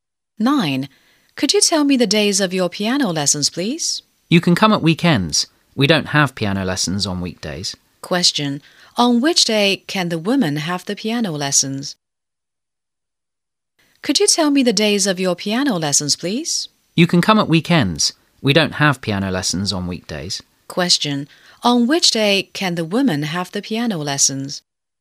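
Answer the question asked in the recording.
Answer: At weekends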